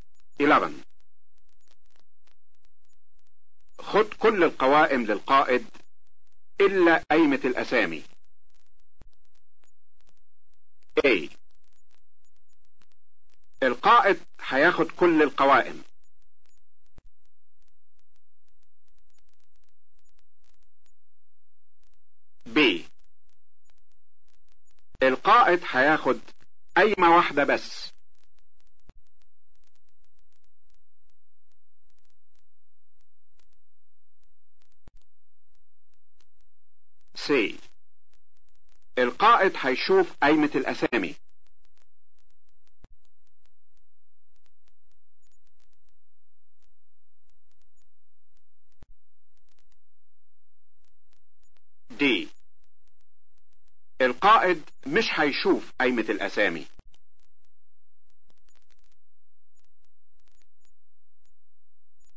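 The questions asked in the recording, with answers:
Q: خد كل القوائم للقائد إلا أيمة الأسامي.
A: D: القائد مش هيشوف قايمة الأسامي.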